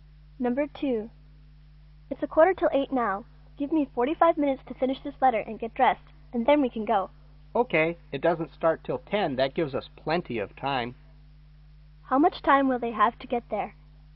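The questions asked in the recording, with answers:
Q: How much time will they have to get there?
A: 1 hour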